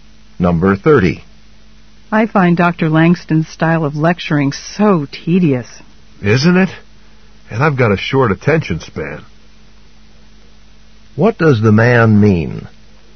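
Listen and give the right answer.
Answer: He also finds the lectures boring and hard to pay attention to.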